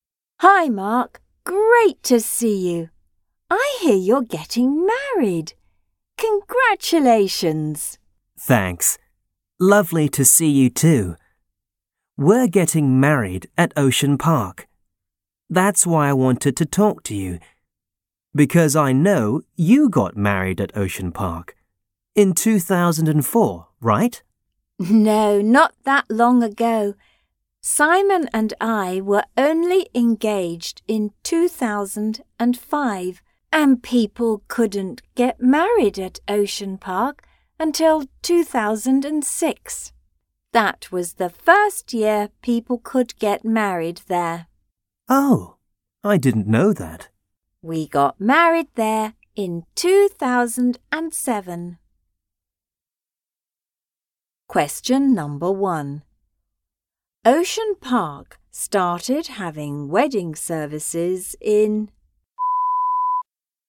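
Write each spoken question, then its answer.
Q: Ocean Park started having wedding services in...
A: 2006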